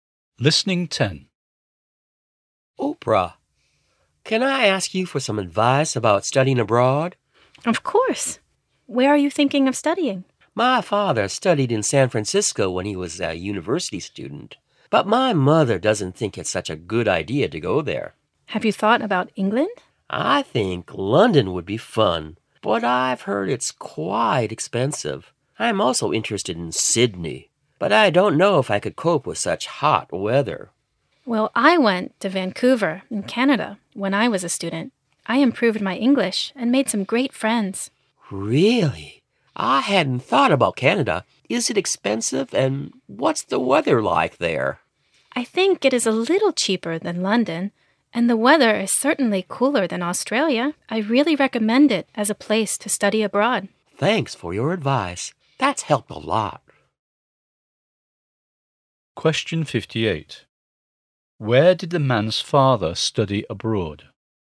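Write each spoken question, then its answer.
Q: Where did the man's father study abroad?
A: San Francisco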